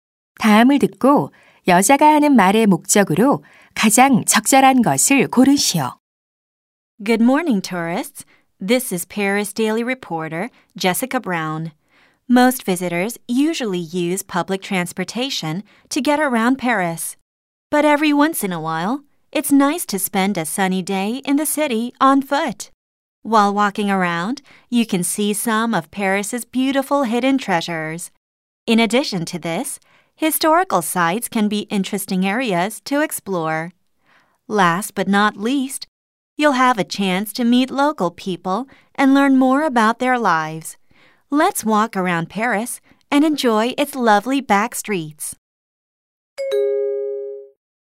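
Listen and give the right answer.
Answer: 파리를 걸어서 관광하도록 권장하려고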